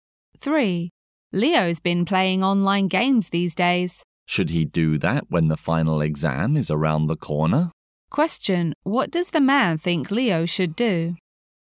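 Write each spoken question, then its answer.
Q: What does the man think Leo should do?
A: Stop playing online games and prepare for the final exam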